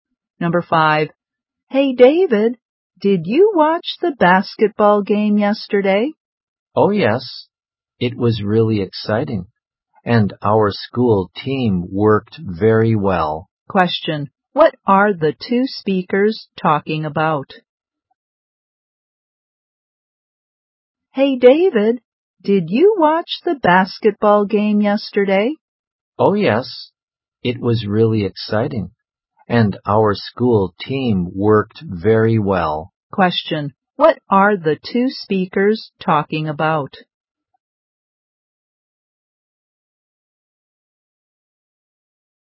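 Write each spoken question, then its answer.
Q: what are the two speakers talking about?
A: A basketball game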